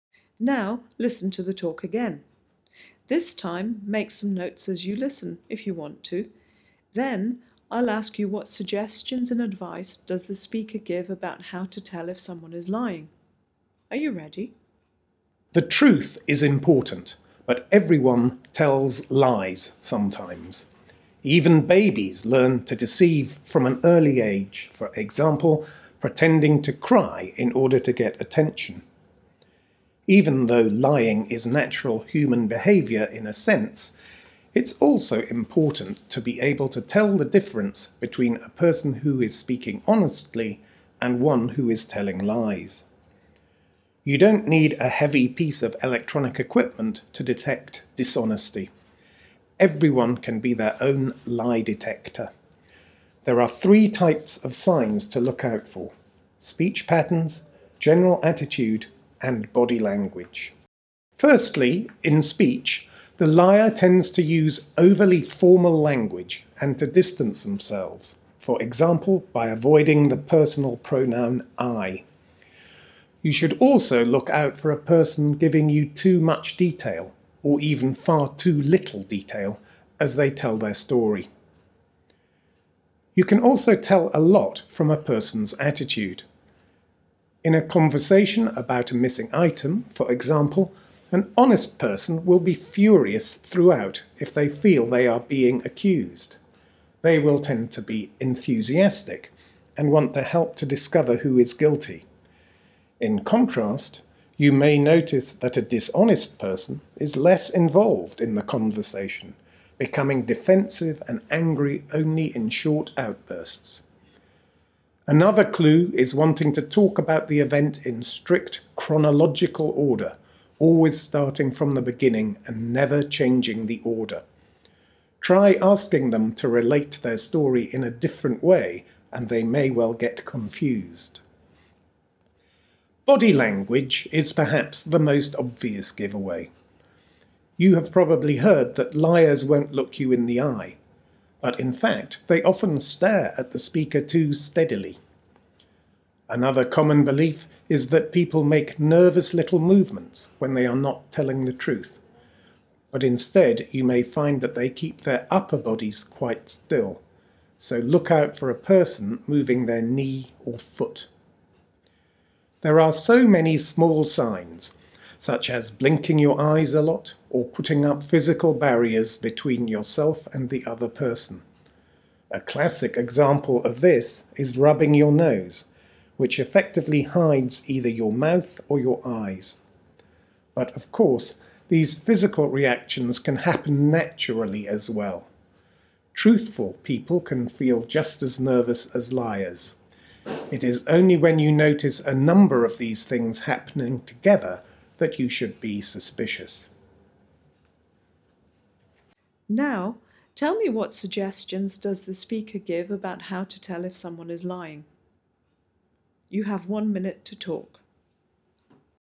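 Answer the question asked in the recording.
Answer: Look at speech (too formal, avoiding 'I', too much or too little detail), attitude (less involved, short angry outbursts, telling events in strict order and getting confused when asked to change it) and body language (staring too steadily, still upper body but moving knee or foot, blinking, barriers such as rubbing the nose); be suspicious only when several signs appear together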